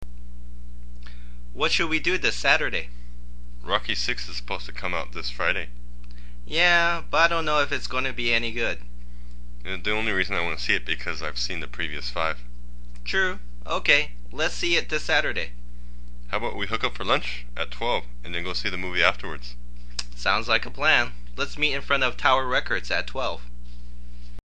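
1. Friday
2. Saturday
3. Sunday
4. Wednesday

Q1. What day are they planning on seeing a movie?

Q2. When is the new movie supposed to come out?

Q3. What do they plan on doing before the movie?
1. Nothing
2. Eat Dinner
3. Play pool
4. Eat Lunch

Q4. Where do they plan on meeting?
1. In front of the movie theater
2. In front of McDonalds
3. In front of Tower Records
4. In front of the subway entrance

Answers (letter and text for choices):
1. 2. Saturday
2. 1. Friday
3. 4. Eat Lunch
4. 3. In front of Tower Records

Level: Basic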